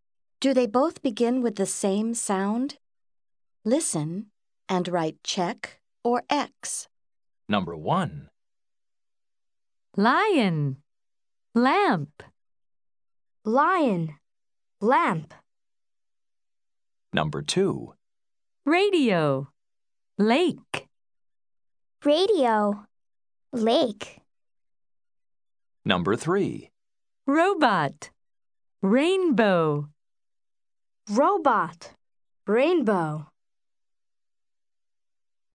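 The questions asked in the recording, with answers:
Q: Lion. Lamp.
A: Yes (check): both begin with the same sound

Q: Radio. Lake.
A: No (X): they begin with different sounds

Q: Robot. Rainbow.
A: Yes (check): both begin with the same sound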